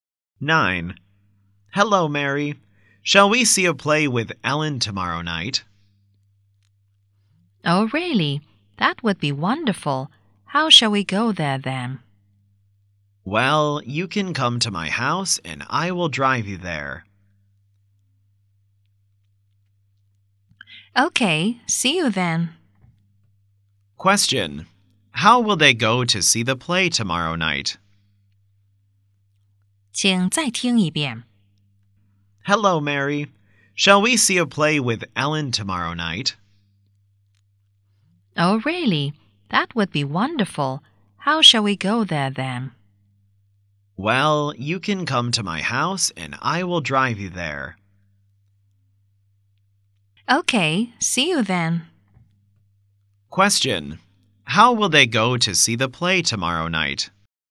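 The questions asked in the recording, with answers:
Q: Question. How will they go to see the play tomorrow night?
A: By car.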